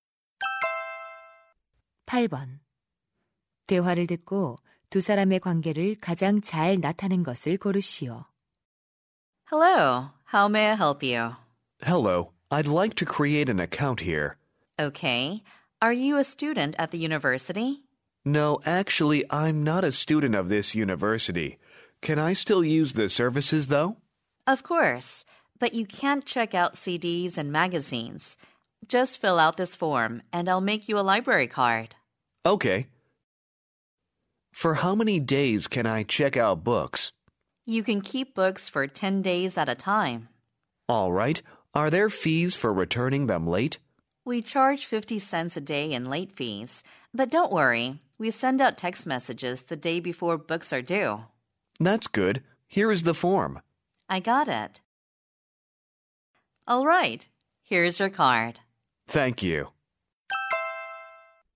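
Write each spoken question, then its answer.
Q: 대화를 듣고 두 사람의 관계를 가장 잘 나타낸 것을 고르시오.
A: 도서관 이용자 - 사서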